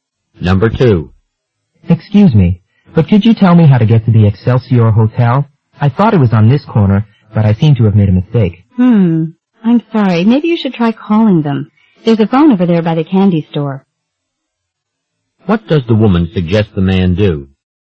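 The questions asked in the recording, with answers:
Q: What does the woman suggest the man do?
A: Call the hotel from the phone by the candy store.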